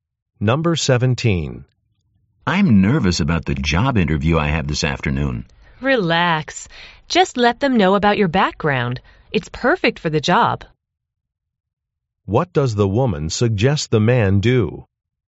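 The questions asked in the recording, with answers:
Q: What does the woman suggest the man do?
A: Tell the interviewers about his background.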